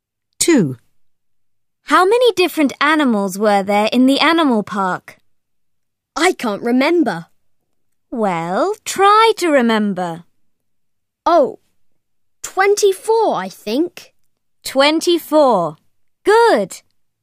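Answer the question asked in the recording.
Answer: 24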